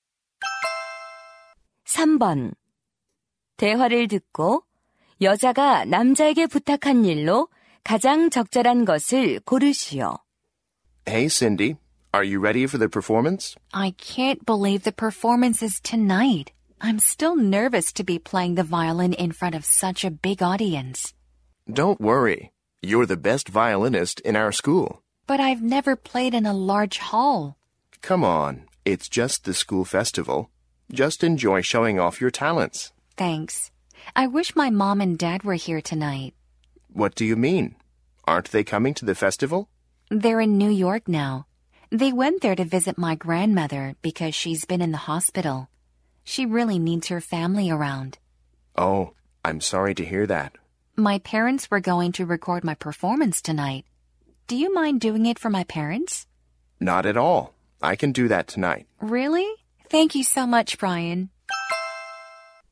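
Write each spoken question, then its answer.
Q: 대화를 듣고 여자가 남자에게 부탁한 일로 가장 적절한 것을 고르시오.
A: 공연 녹화하기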